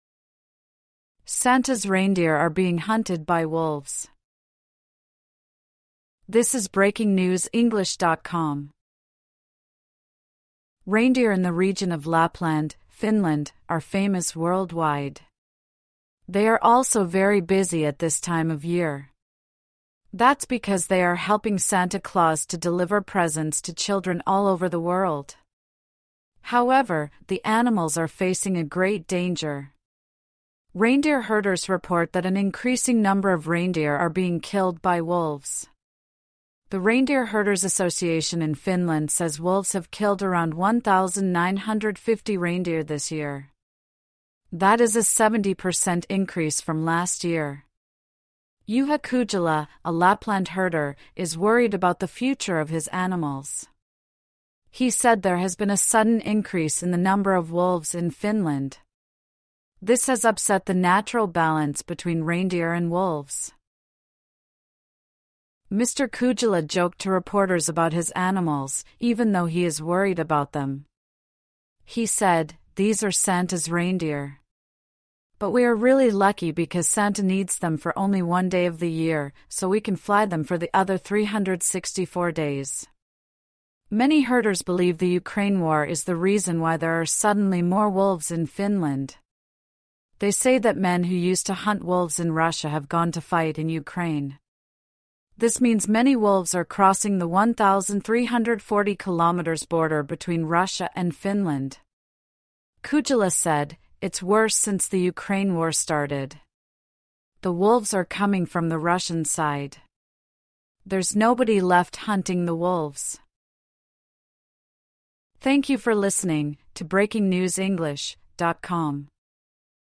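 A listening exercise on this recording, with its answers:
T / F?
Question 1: The region of Lapland is in the north of Norway.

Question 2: Reindeer herders said wolves are killing more and more reindeer.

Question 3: There was a 70% rise in the number of reindeer wolves killed this year.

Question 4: More wolves in Finland have disrupted the reindeer-wolf balance.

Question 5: A herder is happy that he can fly his reindeers 365 days a year.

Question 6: Russia is sending its soldiers to Finland to hunt the wolves.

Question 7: The border between Finland and Russia is over 1,300 km long.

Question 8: A reindeer herder said no one was hunting the wolves.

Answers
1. F
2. T
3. T
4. T
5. F
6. F
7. T
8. T

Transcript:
'Santa's reindeer' are being hunted by wolves
Reindeer in the region of Lapland, Finland, are famous worldwide. They are also very busy at this time of year. That's because they are helping Santa Claus to deliver presents to children all over the world. 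However, the animals are facing a great danger. Reindeer herders report that an increasing number of reindeer are being killed by wolves. The Reindeer Herders' Association in Finland says wolves have killed around 1,950 reindeer this year. That is a 70 per cent increase from last year. Juha Kujala, a Lapland herder, is worried about the future of his animals. He said there has been a sudden increase in the number of wolves in Finland. This has upset the natural balance between reindeer and wolves.
Mr Kujala joked to reporters about his animals, even though he is worried about them. He said: "These are Santa's reindeer. But we are really lucky because Santa needs them for only one day of the year, so we can fly them for the other 364 days." Many herders believe the Ukraine War is the reason why there are suddenly more wolves in Finland. They say that men who used to hunt wolves in Russia have gone to fight in Ukraine. 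This means many wolves are crossing the 1,340-km border between Russia and Finland. Kujala said: "It's worse since the Ukraine War started. The wolves are coming from the Russian side. There's nobody left hunting the wolves."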